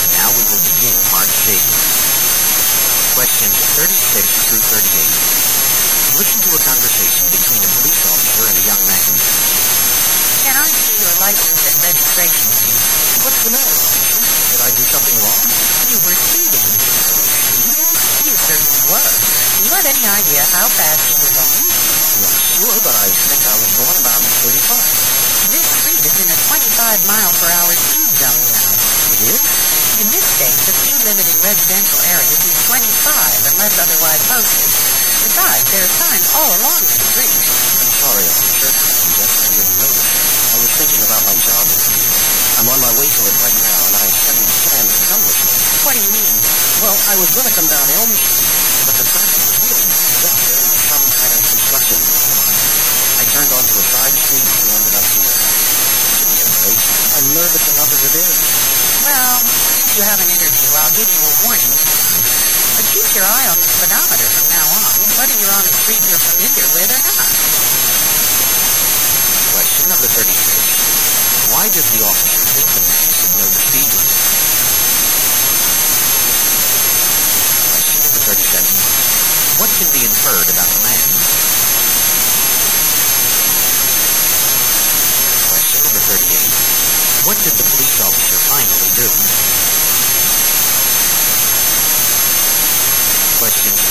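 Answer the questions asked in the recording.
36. There are signs all along the street
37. He is on his way to a job interview
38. Gave the man a warning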